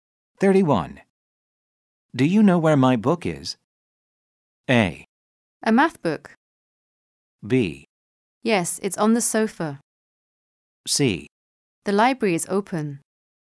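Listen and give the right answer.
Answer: B: Yes, it's on the sofa.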